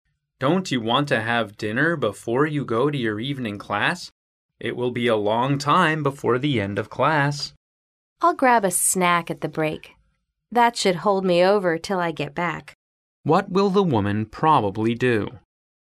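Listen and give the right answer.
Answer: Eat a snack at the class break.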